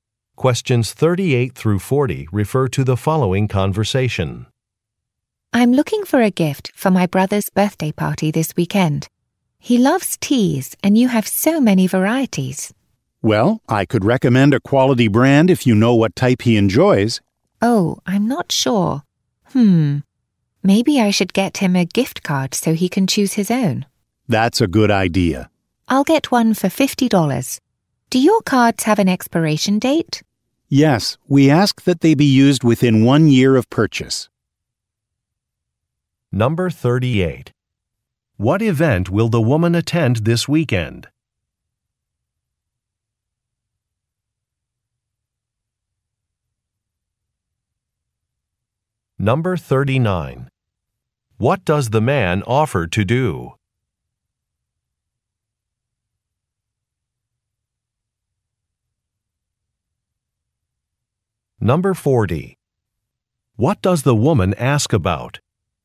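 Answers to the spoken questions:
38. Her brother's birthday party
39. Recommend a quality tea brand
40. Whether gift cards have an expiration date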